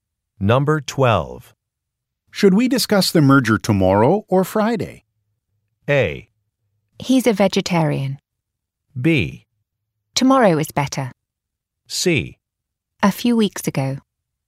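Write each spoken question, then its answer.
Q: Should we discuss the merger tomorrow or Friday?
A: B: Tomorrow is better.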